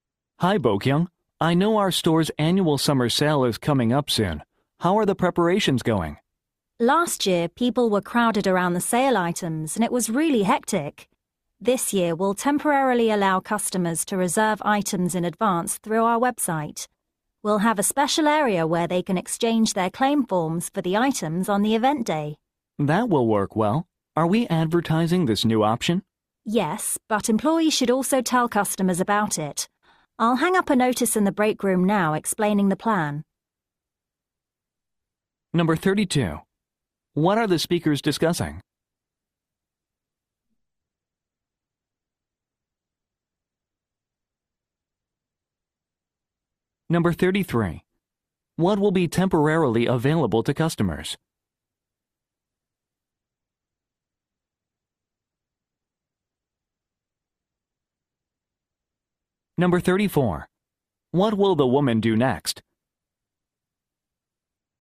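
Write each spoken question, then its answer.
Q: What are the speakers discussing?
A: Preparations for the store's annual summer sale

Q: What will be temporarily available to customers?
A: Reserving items in advance through the website

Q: What will the woman do next?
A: Hang up a notice in the break room explaining the plan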